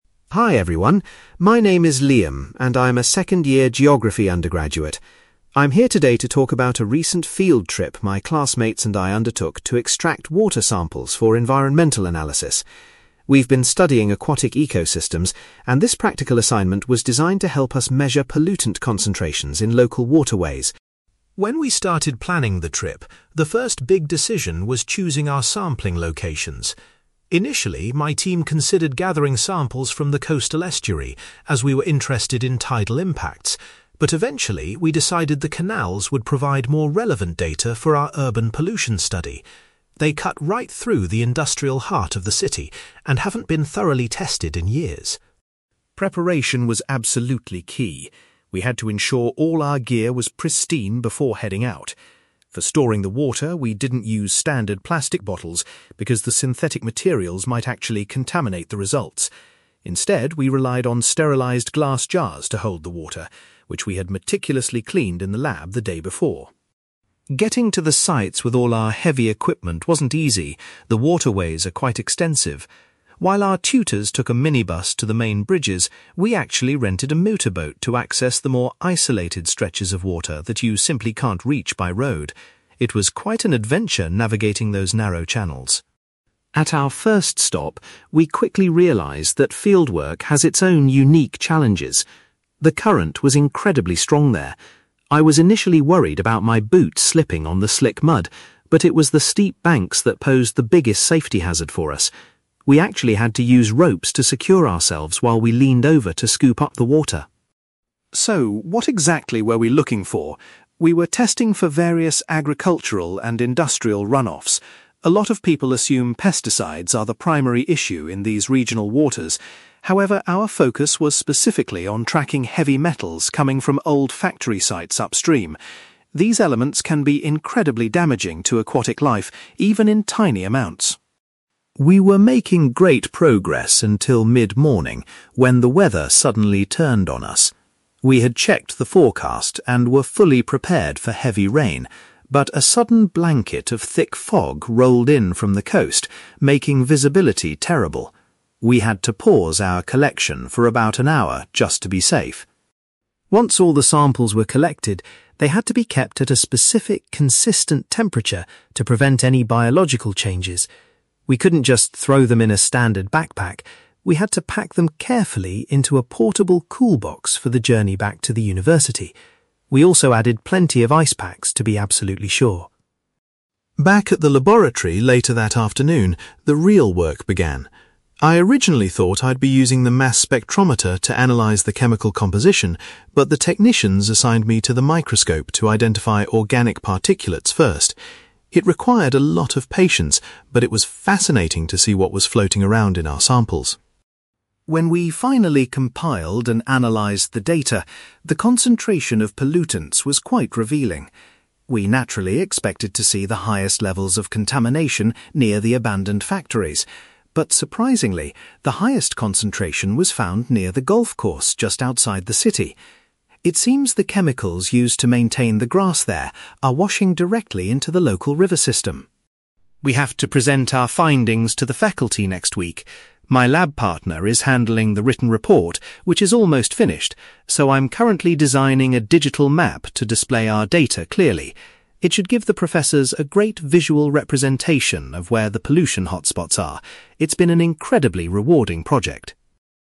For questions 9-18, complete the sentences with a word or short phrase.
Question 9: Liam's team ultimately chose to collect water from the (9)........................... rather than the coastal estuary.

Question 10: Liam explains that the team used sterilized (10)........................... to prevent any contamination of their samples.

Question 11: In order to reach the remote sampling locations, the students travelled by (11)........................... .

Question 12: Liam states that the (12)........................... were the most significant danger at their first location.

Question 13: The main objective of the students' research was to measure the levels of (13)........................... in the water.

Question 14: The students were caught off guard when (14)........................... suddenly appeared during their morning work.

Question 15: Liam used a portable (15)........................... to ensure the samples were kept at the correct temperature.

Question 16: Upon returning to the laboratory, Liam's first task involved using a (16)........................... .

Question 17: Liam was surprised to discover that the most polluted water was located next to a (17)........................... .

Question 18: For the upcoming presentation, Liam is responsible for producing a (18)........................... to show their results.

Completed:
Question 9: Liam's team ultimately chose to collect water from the canals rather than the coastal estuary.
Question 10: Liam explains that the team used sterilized glass jars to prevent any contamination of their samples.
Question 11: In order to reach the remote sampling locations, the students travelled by motorboat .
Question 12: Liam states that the steep banks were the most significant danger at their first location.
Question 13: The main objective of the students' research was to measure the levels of heavy metals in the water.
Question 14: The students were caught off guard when thick fog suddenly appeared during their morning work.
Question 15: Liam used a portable cool box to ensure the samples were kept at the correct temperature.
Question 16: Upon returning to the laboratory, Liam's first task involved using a microscope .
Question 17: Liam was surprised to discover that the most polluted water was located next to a golf course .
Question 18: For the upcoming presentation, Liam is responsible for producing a digital map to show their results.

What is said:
Liam: Hi everyone. My name is Liam, and I'm a second-year geography undergraduate. I'm here today to talk about a recent field trip my classmates and I undertook to extract water samples for environmental analysis. We've been studying aquatic ecosystems, and this practical assignment was designed to help us measure pollutant concentrations in local waterways.
When we started planning the trip, the first big decision was choosing our sampling locations. Initially, my team considered gathering samples from the coastal estuary, as we were interested in tidal impacts, but eventually, we decided the canals would provide more relevant data for our urban pollution study. They cut right through the industrial heart of the city and haven't been thoroughly tested in years.
Preparation was absolutely key. We had to ensure all our gear was pristine before heading out. For storing the water, we didn't use standard plastic bottles because the synthetic materials might actually contaminate the results. Instead, we relied on sterilized glass jars to hold the water, which we had meticulously cleaned in the lab the day before.
Getting to the sites with all our heavy equipment wasn't easy. The waterways are quite extensive. While our tutors took a minibus to the main bridges, we actually rented a motorboat to access the more isolated stretches of water that you simply can't reach by road. It was quite an adventure navigating those narrow channels!
At our first stop, we quickly realised that fieldwork has its own unique challenges. The current was incredibly strong there. I was initially worried about my boots slipping on the slick mud, but it was the steep banks that posed the biggest safety hazard for us. We actually had to use ropes to secure ourselves while we leaned over to scoop up the water.
So, what exactly were we looking for? We were testing for various agricultural and industrial run-offs. A lot of people assume pesticides are the primary issue in these regional waters. However, our focus was specifically on tracking heavy metals coming from old factory sites upstream. These elements can be incredibly damaging to aquatic life even in tiny amounts.
We were making great progress until mid-morning, when the weather suddenly turned on us. We had checked the forecast and were fully prepared for heavy rain, but a sudden blanket of thick fog rolled in from the coast, making visibility terrible. We had to pause our collection for about an hour just to be safe.
Once all the samples were collected, they had to be kept at a specific, consistent temperature to prevent any biological changes. We couldn't just throw them in a standard backpack. We had to pack them carefully into a portable cool box for the journey back to the university. We also added plenty of ice packs to be absolutely sure.
Back at the laboratory later that afternoon, the real work began. I originally thought I'd be using the mass spectrometer to analyse the chemical composition, but the technicians assigned me to the microscope to identify organic particulates first. It required a lot of patience, but it was fascinating to see what was floating around in our samples.
When we finally compiled and analysed the data, the concentration of pollutants was quite revealing. We naturally expected to see the highest levels of contamination near the abandoned factories, but surprisingly, the highest concentration was found near the golf course just outside the city. It seems the chemicals used to maintain the grass there are washing directly into the local river system.
We have to present our findings to the faculty next week. My lab partner is handling the written report, which is almost finished, so I'm currently designing a digital map to display our data clearly. It should give the professors a great visual representation of where the pollution hotspots are. It's been an incredibly rewarding project!

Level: B2